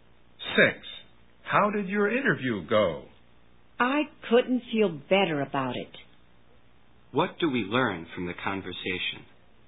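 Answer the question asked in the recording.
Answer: The interview went very well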